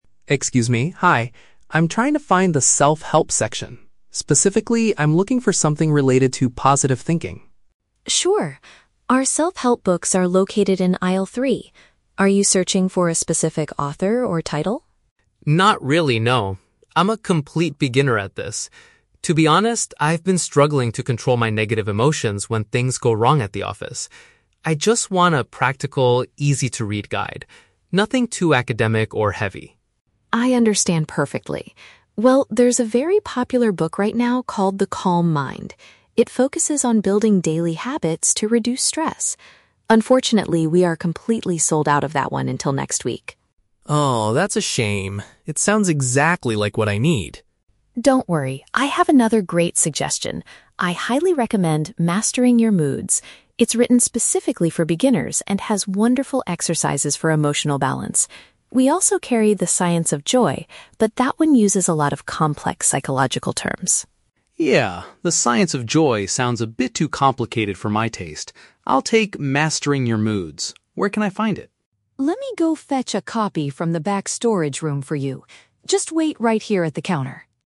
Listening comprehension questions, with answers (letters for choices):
Listen to a conversation between a customer and a bookstore clerk. Choose the correct answer (A, B, or C) for each question.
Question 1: Why is the customer looking for a self-help book?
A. He needs to write an academic paper on positive psychology.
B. He wants to learn how to manage his feelings better at his job.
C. He hopes to help a family member who is constantly stressed.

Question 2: Why can't the customer purchase the book "The Calm Mind" today?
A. There are no copies currently available in the store.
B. The book contains information that is too scientific for him.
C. The book is only sold in the psychology section, not self-help.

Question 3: What will the bookstore clerk do next?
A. Walk with the customer to aisle three to show him the books.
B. Process the customer's payment at the cash register.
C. Get the chosen book from a different room in the store.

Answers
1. B
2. A
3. C

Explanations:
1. Alex says he has been "struggling to control my negative emotions when things go wrong at the office". This is paraphrased as wanting to "manage his feelings better at his job". The Trap (A): The word "academic" is mentioned, but Alex explicitly says he wants a book that is "nothing too academic" (Mentioned but rejected). Plausible Trap (C): Buying a book for a stressed family member is a very realistic scenario, but Alex is buying it for himself (Not mentioned).
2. Emma says they are "completely sold out of that one until next week", which means "no copies currently available in the store". The Trap (B): A book being too complicated/scientific is discussed in the audio, but that refers to a different book, "The Science of Joy" (Mentioned but wrong context).

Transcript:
Alex: Excuse me, hi. I'm trying to find the self-help section. Specifically, I'm looking for something related to positive thinking.
Emma: Sure! Our self-help books are located in aisle three. Are you searching for a specific author or title?
Alex: Not really, no. I'm a complete beginner at this. To be honest, I've been struggling to control my negative emotions when things go wrong at the office. I just want a practical, easy-to-read guide. Nothing too academic or heavy.
Emma: I understand perfectly. Well, there's a very popular book right now called "The Calm Mind". It focuses on building daily habits to reduce stress. Unfortunately, we are completely sold out of that one until next week.
Alex: Oh, that's a shame. It sounds exactly like what I need.
Emma: Don't worry, I have another great suggestion. I highly recommend "Mastering Your Moods". It's written specifically for beginners and has wonderful exercises for emotional balance. We also carry "The Science of Joy", but that one uses a lot of complex psychological terms.
Alex: Yeah, "The Science of Joy" sounds a bit too complicated for my taste. I'll take "Mastering Your Moods". Where can I find it?
Emma: Let me go fetch a copy from the back storage room for you. Just wait right here at the counter.